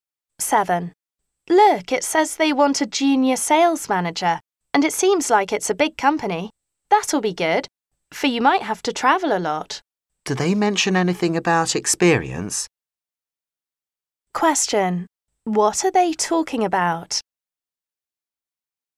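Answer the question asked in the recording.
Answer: A job advertisement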